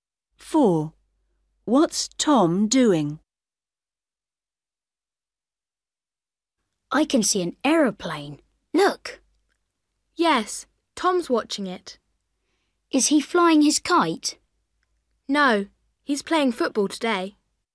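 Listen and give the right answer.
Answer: playing football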